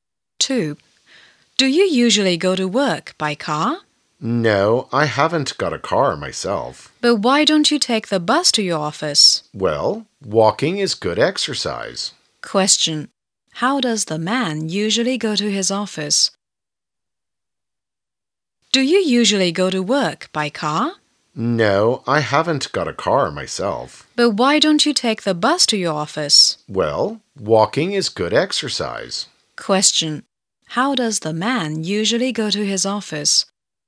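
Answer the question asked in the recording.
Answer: On foot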